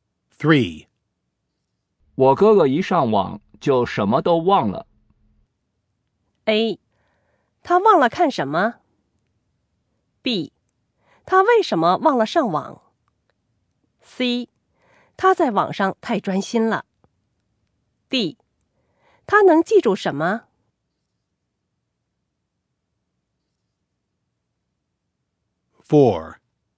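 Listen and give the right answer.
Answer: C: 他在网上太专心了。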